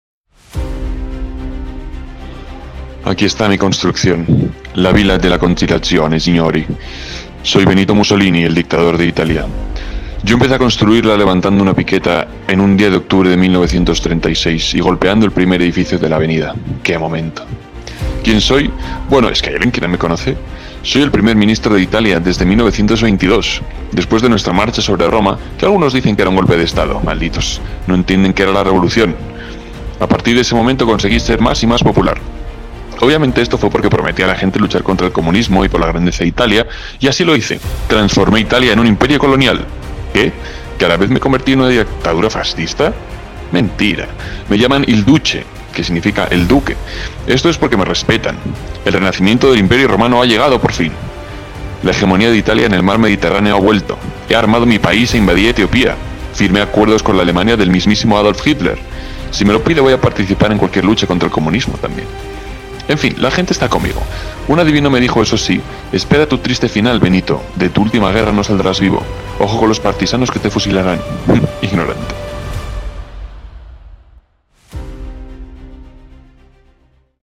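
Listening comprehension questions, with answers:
¿Quién fue el primer ministro italiano que inició la construcción de la Avenida de la Conciliación?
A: Benito Mussolini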